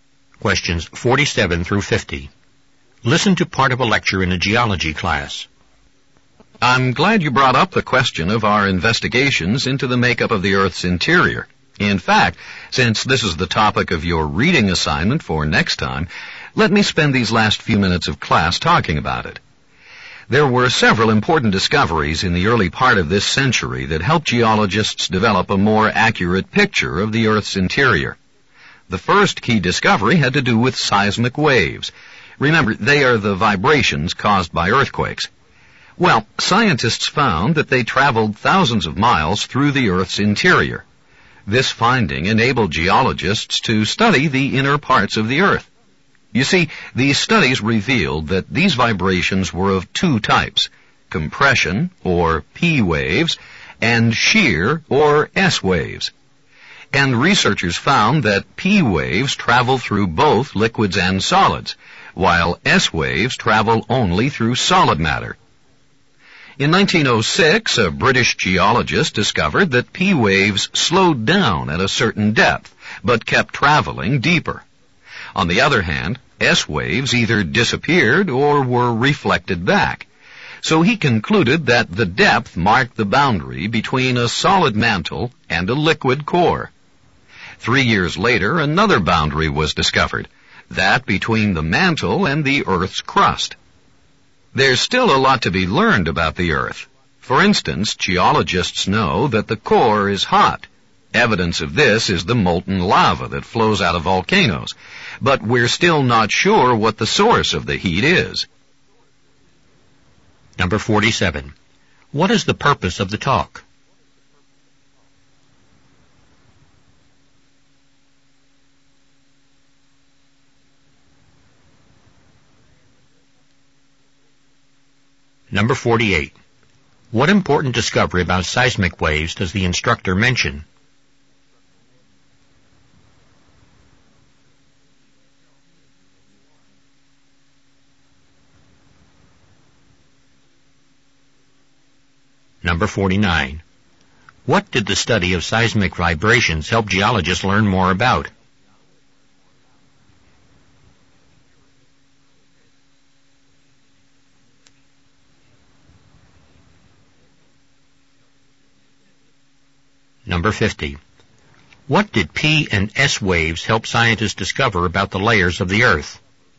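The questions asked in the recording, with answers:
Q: What important discovery about seismic waves does the instructor mention?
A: They travel thousands of miles through the Earth's interior

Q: What did the study of seismic vibrations help geologists learn more about?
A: The inner parts of the Earth

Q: What did P and S waves help scientists discover about the layers of the Earth?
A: The boundary between a solid mantle and a liquid core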